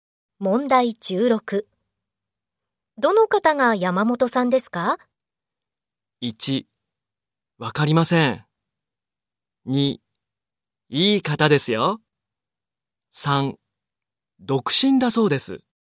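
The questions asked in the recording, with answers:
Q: どの方が山本さんですか?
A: 1: わかりません。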